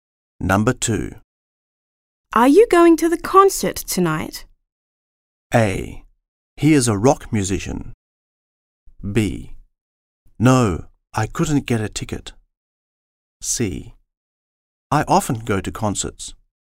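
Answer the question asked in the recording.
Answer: B: No, I couldn't get a ticket.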